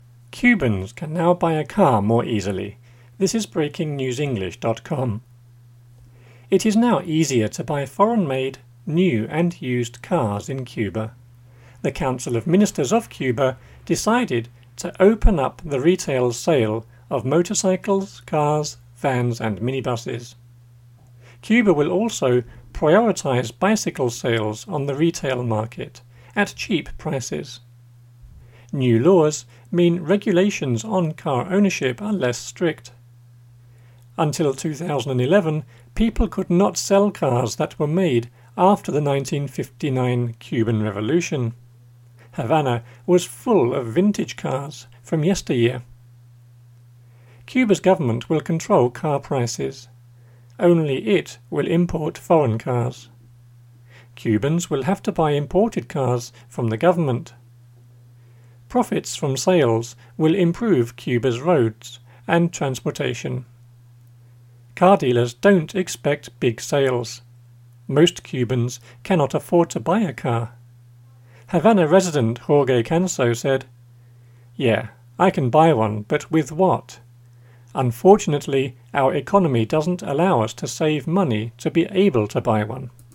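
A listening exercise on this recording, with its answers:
Listen and choose the correct word in the grey box with the "up / down" arrows.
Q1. It is now to buy foreign , new and used cars in Cuba.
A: easier; made

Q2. The Council of Ministers of Cuba decided, "to open the retail of...motorcycles, cars, vans and minibuses."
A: up; sale

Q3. Cuba will also "prioritize bicycle sales on the market" at cheap .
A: retail; prices

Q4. New laws mean regulations on car are less .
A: ownership; strict

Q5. Until 2011, people could not sell cars that were made after the 1959 Cuban .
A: Revolution

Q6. Havana was full of vintage cars from .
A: yesteryear

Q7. Cuba's government will car prices.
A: control

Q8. Cubans will have to buy cars from the .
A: imported; government

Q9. Profits from sales will improve Cuba's roads and .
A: transportation

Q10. Car don't expect big sales.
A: dealers

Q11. Most Cubans cannot to buy a car.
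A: afford

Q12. Havana Jorge Canso said: "Yeah, I can buy one, but with ?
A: resident; what

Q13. Unfortunately our doesn't allow us to save to be able to buy one."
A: economy; money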